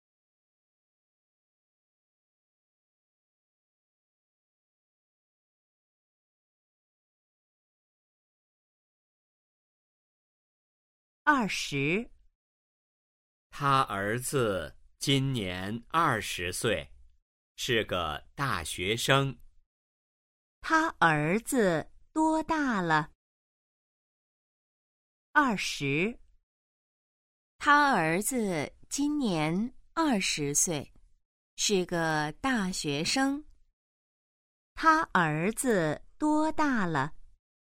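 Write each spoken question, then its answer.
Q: 他儿子多大了?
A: 二十岁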